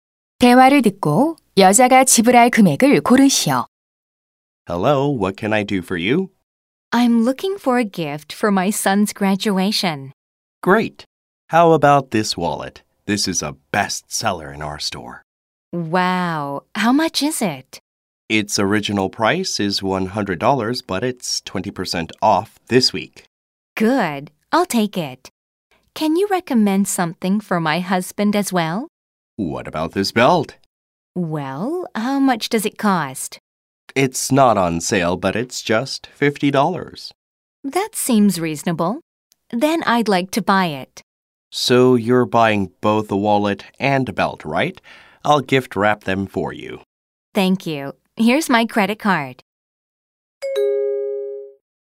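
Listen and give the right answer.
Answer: 130달러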